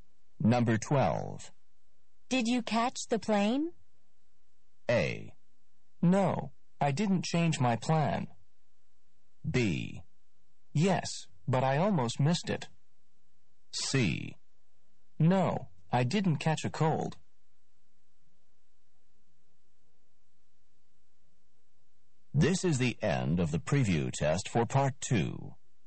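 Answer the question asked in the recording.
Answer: B: Yes, but I almost missed it.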